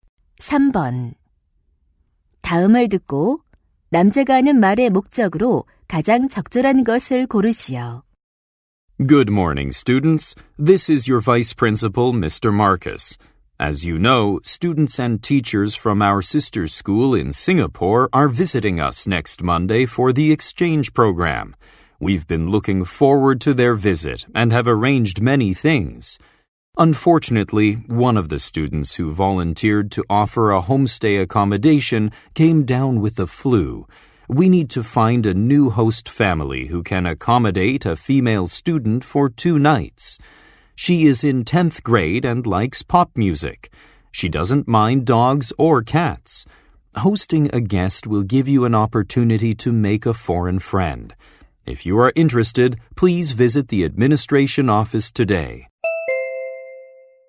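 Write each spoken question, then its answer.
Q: 다음을 듣고 남자가 하는 말의 목적으로 가장 적절한 것을 고르시오.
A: 교환 학생을 맞이할 새 홈스테이 가정을 구하려고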